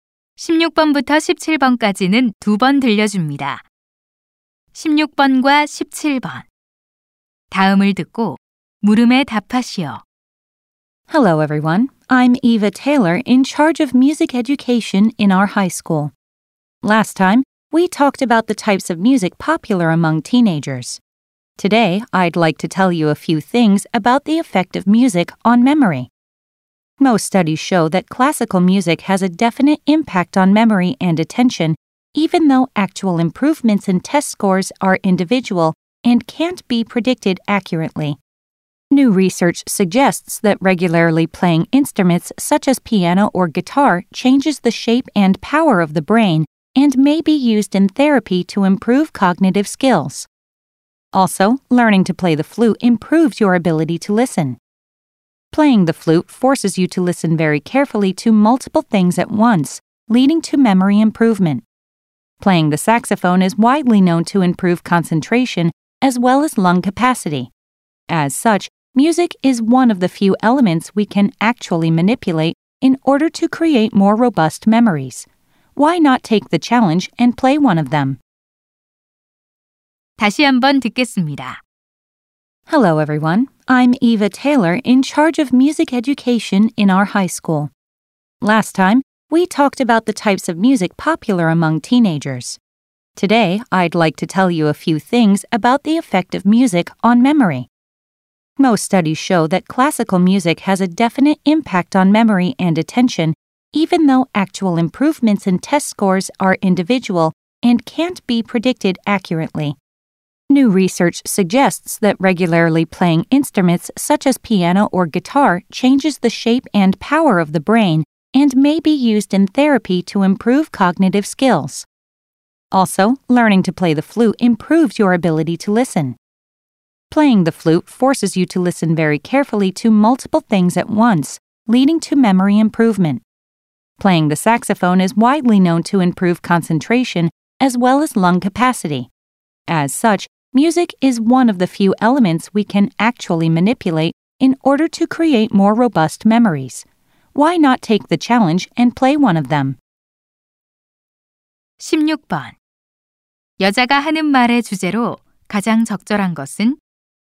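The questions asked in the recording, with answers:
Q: 여자가 하는 말의 주제로 가장 적절한 것은?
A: 음악이 기억력에 미치는 영향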